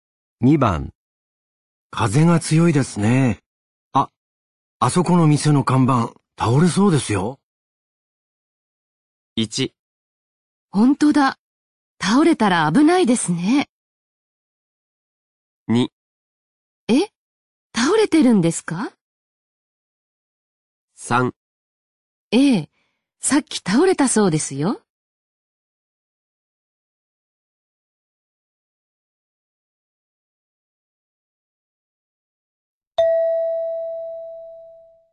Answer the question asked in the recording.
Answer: 1

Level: N3 Listening · Test 12